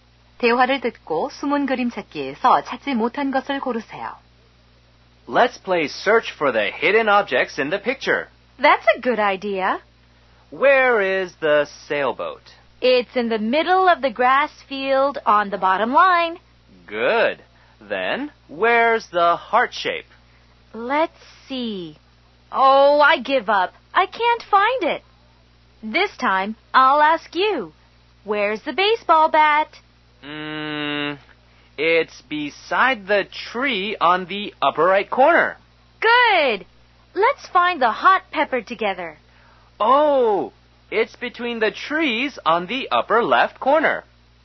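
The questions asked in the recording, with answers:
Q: 대화를 듣고 숨은 그림 찾기에서 찾지 못한 것을 고르세요.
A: 하트 모양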